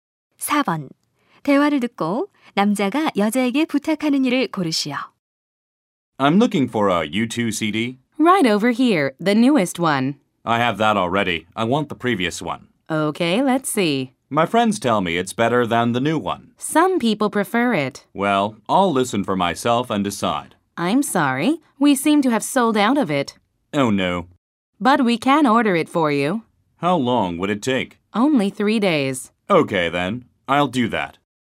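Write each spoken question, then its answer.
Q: 대화를 듣고 남자가 여자에게 부탁하는 일을 고르시오.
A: U2의 이전 CD 주문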